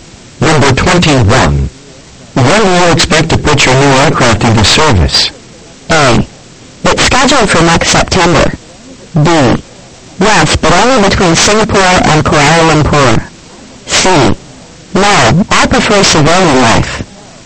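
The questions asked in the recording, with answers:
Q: When do you expect to put your new aircraft into service?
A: A: It's scheduled for next September.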